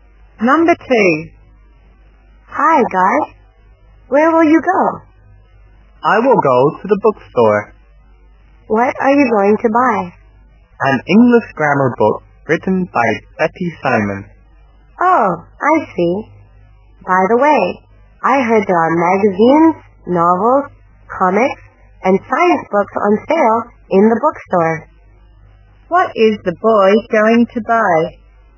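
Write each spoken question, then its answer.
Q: What is the boy going to buy?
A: An English grammar book written by Betty Simon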